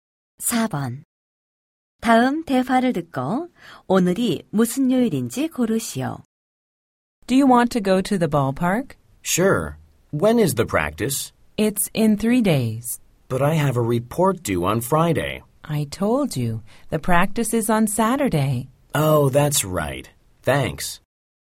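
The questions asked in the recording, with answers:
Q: 다음 대화를 듣고 오늘이 무슨 요일인지 고르시오.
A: 수요일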